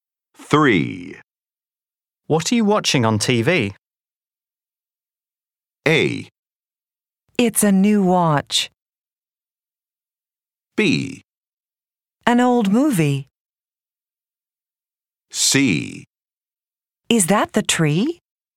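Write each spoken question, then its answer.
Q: What are you watching on TV?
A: B: An old movie.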